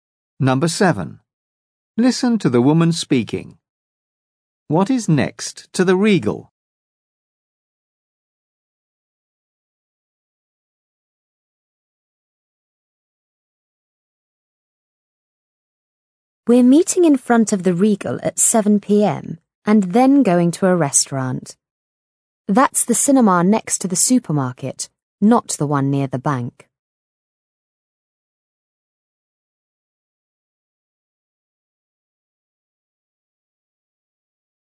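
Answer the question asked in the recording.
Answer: The supermarket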